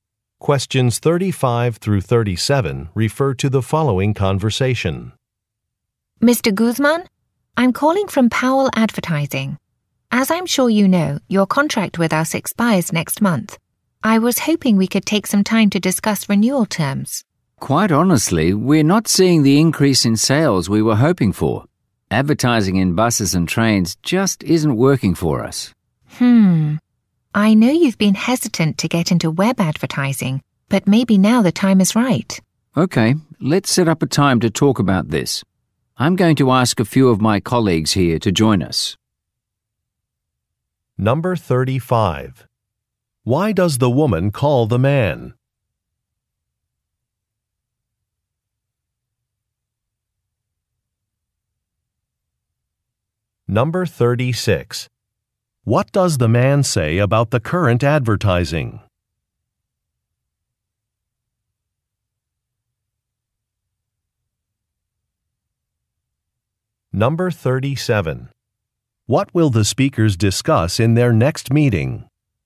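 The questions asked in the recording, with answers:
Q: Why does the woman call the man?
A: To discuss renewing his contract

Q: What does the man say about the current advertising?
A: It is not increasing sales

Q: What will the speakers discuss in their next meeting?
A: Web advertising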